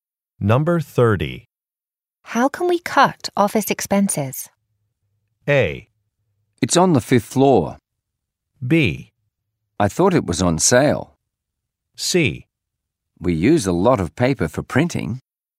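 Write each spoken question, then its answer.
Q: How can we cut office expenses?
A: C: We use a lot of paper for printing.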